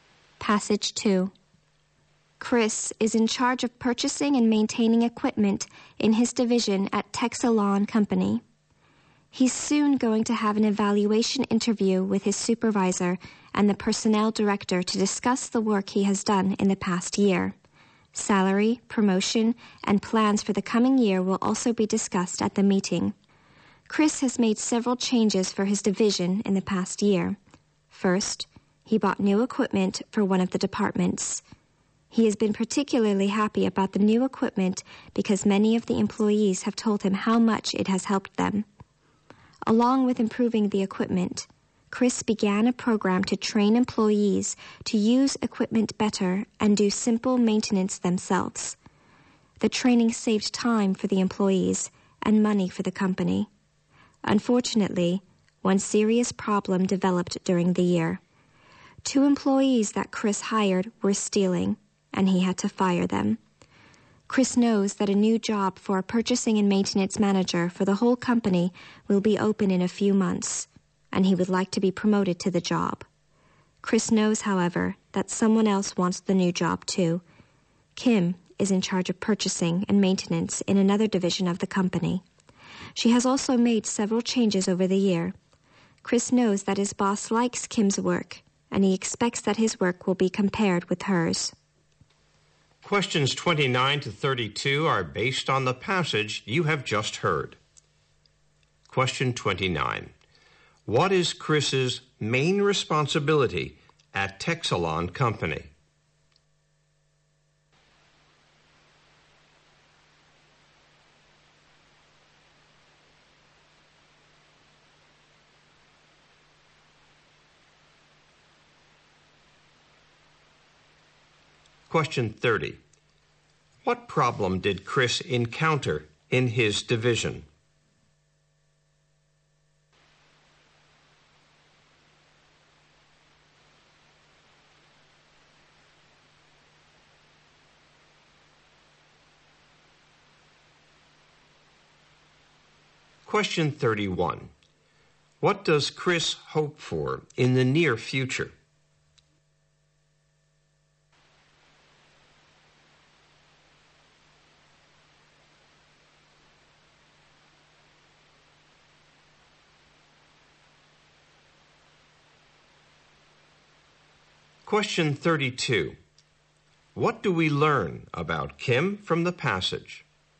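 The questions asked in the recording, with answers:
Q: What is Chris's main responsibility at Texalawn Company?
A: Buying and maintaining equipment in his division

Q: What problem did Chris encounter in his division?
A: Two employees he hired were stealing

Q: What does Chris hope for in the near future?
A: To be promoted to purchasing and maintenance manager for the whole company

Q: What do we learn about Kim from the passage?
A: She is competing with Chris for the new job, and the boss likes her work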